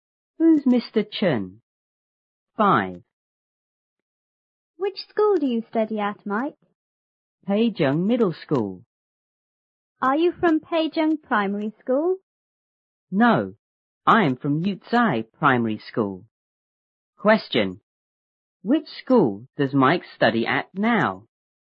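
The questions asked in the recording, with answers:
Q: Which school does Mike study at now?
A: Peijing Middle School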